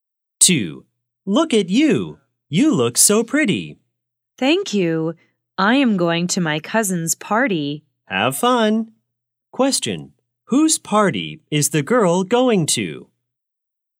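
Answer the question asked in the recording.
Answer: Her cousin's party.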